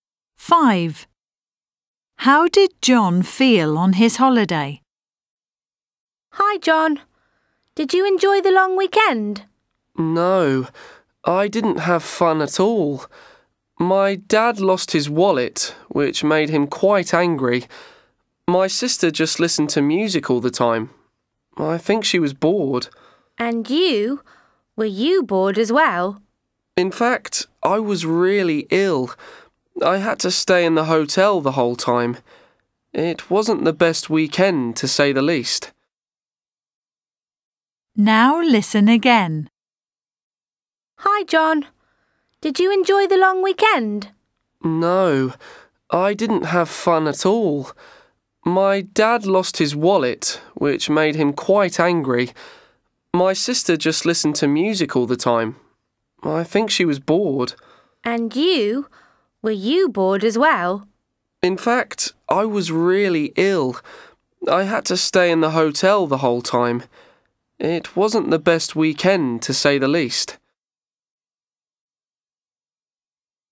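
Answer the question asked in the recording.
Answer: Ill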